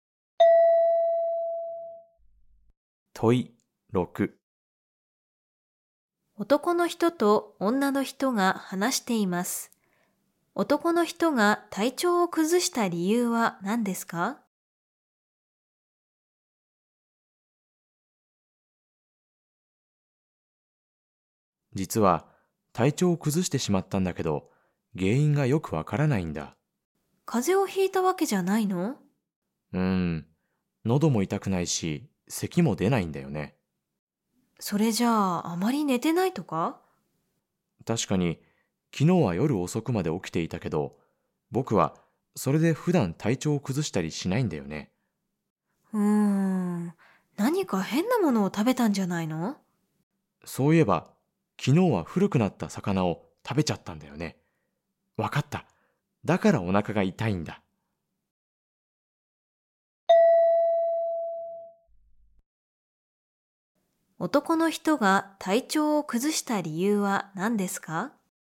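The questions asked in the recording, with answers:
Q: 男の人が体調を崩した理由は何ですか?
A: 古くなった魚を食べたから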